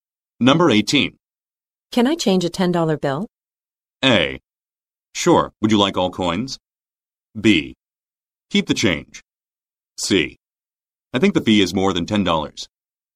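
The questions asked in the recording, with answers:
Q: Can I change a $10 bill?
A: A: Sure, would you like all coins?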